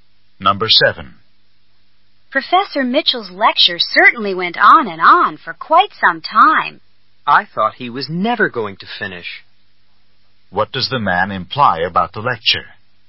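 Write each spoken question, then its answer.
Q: What does the man imply about the lecture?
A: It was very long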